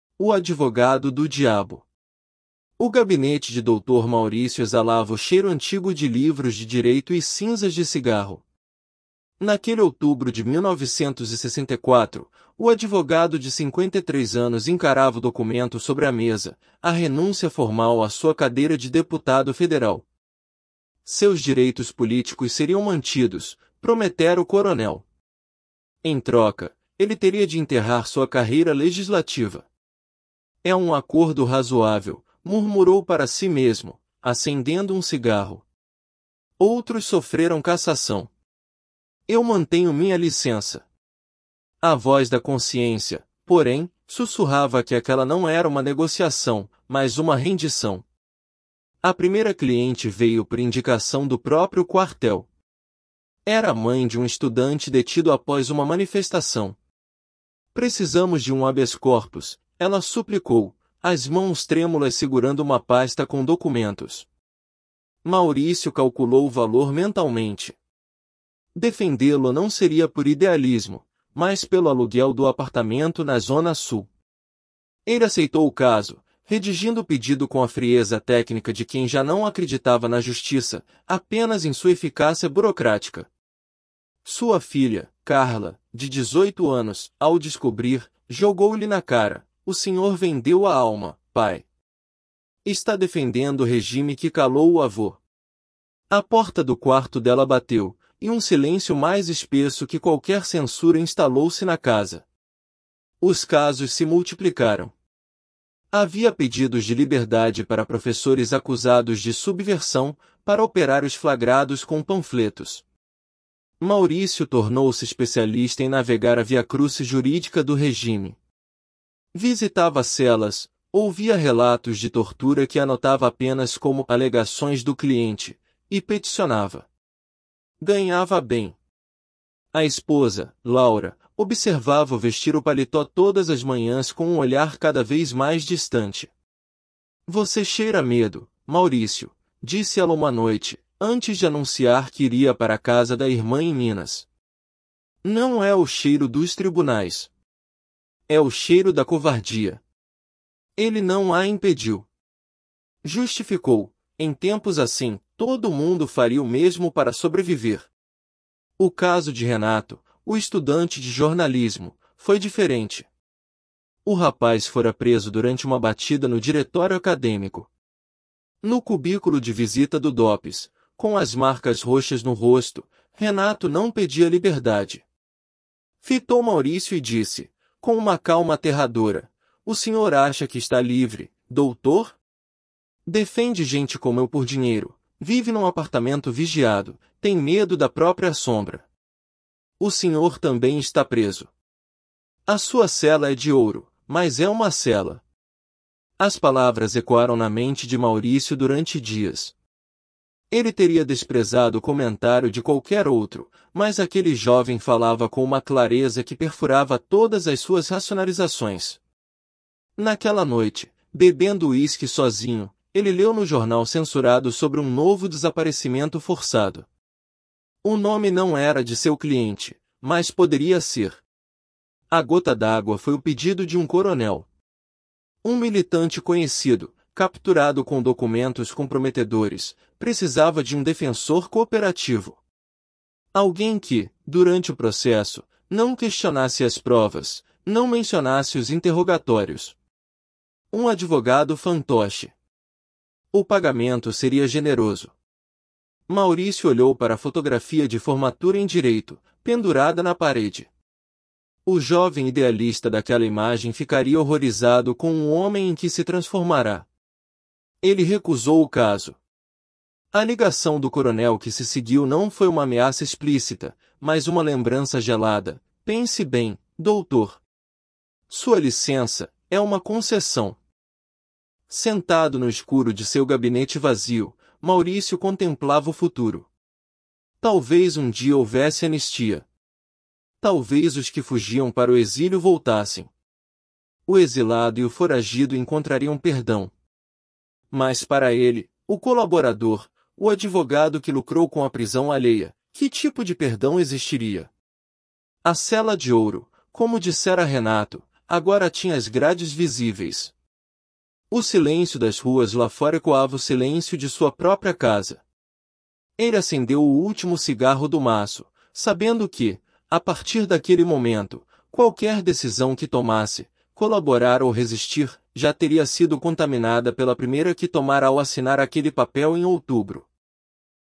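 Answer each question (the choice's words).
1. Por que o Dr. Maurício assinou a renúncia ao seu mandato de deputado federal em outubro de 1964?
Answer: Para manter seus direitos políticos e sua licença de advogado, evitando a cassação.

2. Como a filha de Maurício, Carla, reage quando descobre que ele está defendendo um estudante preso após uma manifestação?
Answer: Diz que ele vendeu a alma e defende o regime que calou o avô, e bate a porta do quarto.

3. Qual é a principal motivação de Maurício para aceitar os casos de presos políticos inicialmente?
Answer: O dinheiro, para pagar o aluguel do apartamento na Zona Sul.

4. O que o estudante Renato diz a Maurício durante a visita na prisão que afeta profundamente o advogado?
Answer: Que ele também está preso: a sua cela é de ouro, mas é uma cela.

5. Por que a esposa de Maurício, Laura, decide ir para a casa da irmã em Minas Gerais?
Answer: Porque se distanciou dele e o acusa de cheirar a medo e covardia.

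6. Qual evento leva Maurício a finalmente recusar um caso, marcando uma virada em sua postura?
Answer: O pedido de um coronel para ser um advogado fantoche na defesa de um militante conhecido.

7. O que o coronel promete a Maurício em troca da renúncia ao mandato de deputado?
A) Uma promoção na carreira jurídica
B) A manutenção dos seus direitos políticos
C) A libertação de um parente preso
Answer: A manutenção dos seus direitos políticos

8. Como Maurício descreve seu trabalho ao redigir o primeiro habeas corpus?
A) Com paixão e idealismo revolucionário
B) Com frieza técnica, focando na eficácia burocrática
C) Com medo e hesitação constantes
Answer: Com frieza técnica, focando na eficácia burocrática

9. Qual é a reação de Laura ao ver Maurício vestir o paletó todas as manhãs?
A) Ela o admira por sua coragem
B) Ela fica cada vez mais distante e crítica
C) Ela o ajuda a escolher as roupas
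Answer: Ela fica cada vez mais distante e crítica

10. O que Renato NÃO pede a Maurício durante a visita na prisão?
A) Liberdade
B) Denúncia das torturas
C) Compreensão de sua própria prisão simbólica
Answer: Liberdade

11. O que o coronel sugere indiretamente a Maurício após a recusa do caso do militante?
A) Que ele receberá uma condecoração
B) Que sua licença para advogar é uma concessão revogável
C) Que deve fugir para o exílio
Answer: Que sua licença para advogar é uma concessão revogável

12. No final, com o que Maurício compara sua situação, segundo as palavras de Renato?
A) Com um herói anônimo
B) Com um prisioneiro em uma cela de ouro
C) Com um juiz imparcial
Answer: Com um prisioneiro em uma cela de ouro

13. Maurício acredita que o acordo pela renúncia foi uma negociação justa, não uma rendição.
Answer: Falso

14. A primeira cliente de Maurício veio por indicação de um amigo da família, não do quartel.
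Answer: Falso

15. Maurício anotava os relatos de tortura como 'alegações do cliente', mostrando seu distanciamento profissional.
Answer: Verdadeiro

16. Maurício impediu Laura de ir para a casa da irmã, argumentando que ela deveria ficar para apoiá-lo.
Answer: Falso

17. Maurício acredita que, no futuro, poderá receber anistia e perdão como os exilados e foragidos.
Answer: Falso

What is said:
O Advogado do Diabo – TEST
O gabinete de Dr. Maurício exalava o cheiro antigo de livros de direito e cinzas de cigarro. Naquele outubro de 1964, o advogado de cinquenta e três anos encarava o documento sobre a mesa: a renúncia formal à sua cadeira de deputado federal. Seus direitos políticos seriam mantidos, prometera o coronel. Em troca, ele teria de enterrar sua carreira legislativa. 'É um acordo razoável', murmurou para si mesmo, acendendo um cigarro. 'Outros sofreram cassação. Eu mantenho minha licença.' A voz da consciência, porém, sussurrava que aquela não era uma negociação, mas uma rendição.
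A primeira cliente veio por indicação do próprio quartel. Era a mãe de um estudante detido após uma manifestação. 'Precisamos de um habeas corpus', ela suplicou, as mãos trêmulas segurando uma pasta com documentos. Maurício calculou o valor mentalmente. Defendê-lo não seria por idealismo, mas pelo aluguel do apartamento na zona sul. Ele aceitou o caso, redigindo o pedido com a frieza técnica de quem já não acreditava na justiça, apenas em sua eficácia burocrática. Sua filha, Carla, de dezoito anos, ao descobrir, jogou-lhe na cara: 'O senhor vendeu a alma, pai. Está defendendo o regime que calou o avô.' A porta do quarto dela bateu, e um silêncio mais espesso que qualquer censura instalou-se na casa.
Os casos se multiplicaram. Havia pedidos de liberdade para professores acusados de subversão, para operários flagrados com panfletos. Maurício tornou-se especialista em navegar a via-crúcis jurídica do regime. 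Visitava celas, ouvia relatos de tortura que anotava apenas como 'alegações do cliente', e peticionava. Ganhava bem. A esposa, Laura, observava-o vestir o paletó todas as manhãs com um olhar cada vez mais distante. 'Você cheira a medo, Maurício', disse ela uma noite, antes de anunciar que iria para a casa da irmã em Minas. 'Não é o cheiro dos tribunais. É o cheiro da covardia.' Ele não a impediu. Justificou: em tempos assim, todo mundo faria o mesmo para sobreviver.
O caso de Renato, o estudante de jornalismo, foi diferente. O rapaz fora preso durante uma batida no diretório acadêmico. No cubículo de visita do DOPS, com as marcas roxas no rosto, Renato não pedia liberdade. Fitou Maurício e disse, com uma calma aterradora: 'O senhor acha que está livre, doutor? Defende gente como eu por dinheiro, vive num apartamento vigiado, tem medo da própria sombra. O senhor também está preso. A sua cela é de ouro, mas é uma cela.' As palavras ecoaram na mente de Maurício durante dias. 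Ele teria desprezado o comentário de qualquer outro, mas aquele jovem falava com uma clareza que perfurava todas as suas racionalizações. Naquela noite, bebendo uísque sozinho, ele leu no jornal censurado sobre um novo desaparecimento forçado. O nome não era de seu cliente, mas poderia ser.
A gota d'água foi o pedido de um coronel. Um militante conhecido, capturado com documentos comprometedores, precisava de um defensor 'cooperativo'. Alguém que, durante o processo, não questionasse as provas, não mencionasse os interrogatórios. Um advogado fantoche. O pagamento seria generoso. Maurício olhou para a fotografia de formatura em direito, pendurada na parede. O jovem idealista daquela imagem ficaria horrorizado com o homem em que se transformara. Ele recusou o caso. A ligação do coronel que se seguiu não foi uma ameaça explícita, mas uma lembrança gelada: 'Pense bem, doutor. Sua licença... 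é uma concessão.'
Sentado no escuro de seu gabinete vazio, Maurício contemplava o futuro. Talvez um dia houvesse anistia. Talvez os que fugiam para o exílio voltassem. O exilado e o foragido encontrariam perdão. Mas para ele, o colaborador, o advogado que lucrou com a prisão alheia, que tipo de perdão existiria? A cela de ouro, como dissera Renato, agora tinha as grades visíveis. O silêncio das ruas lá fora ecoava o silêncio de sua própria casa. Ele acendeu o último cigarro do maço, sabendo que, a partir daquele momento, qualquer decisão que tomasse – colaborar ou resistir – já teria sido contaminada pela primeira que tomara ao assinar aquele papel em outubro.
Summary: Dr.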